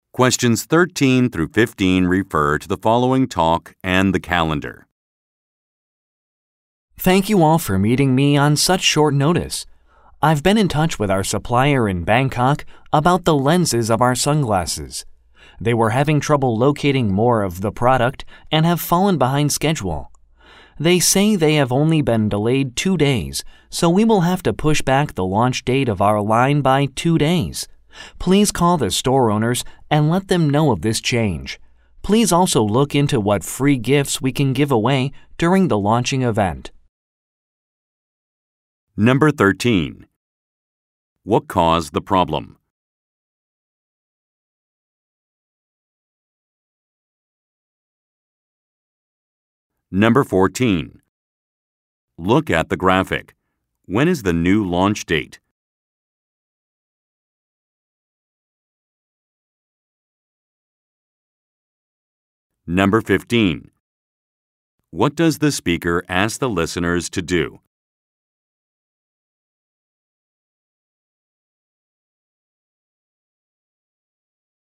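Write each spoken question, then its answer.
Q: What caused the problem?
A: The supplier had trouble finding more lenses, so it fell behind schedule.

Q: What does the speaker ask the listeners to do?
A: Call the store owners about the change in launch date.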